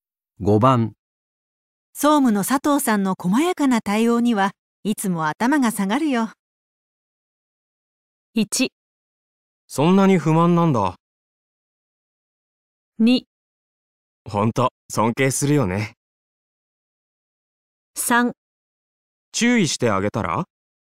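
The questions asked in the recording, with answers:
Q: 総務の佐藤さんの細やかな対応にはいつも頭が下がるよ。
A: 2: ほんと、尊敬するよね。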